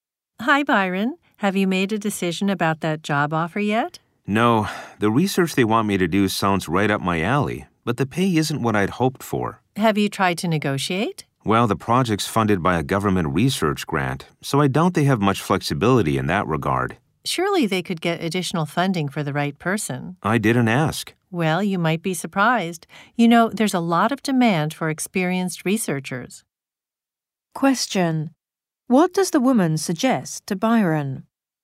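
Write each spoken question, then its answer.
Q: What does the woman suggest to Byron?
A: That he try to negotiate a higher salary, since they might find extra funding for him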